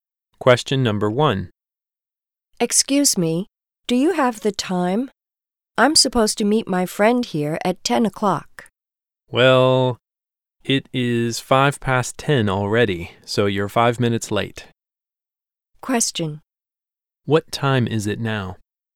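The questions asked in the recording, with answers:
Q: What time is it now?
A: 10:05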